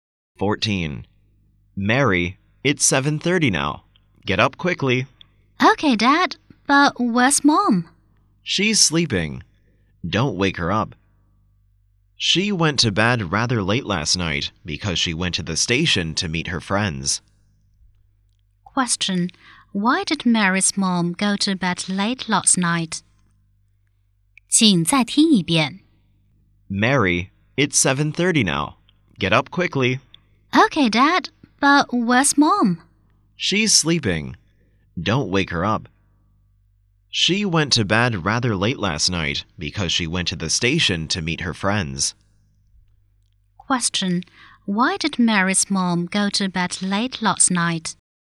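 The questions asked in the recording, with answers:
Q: Why did Mary's mom go to bed late last night?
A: She went to the station to meet her friends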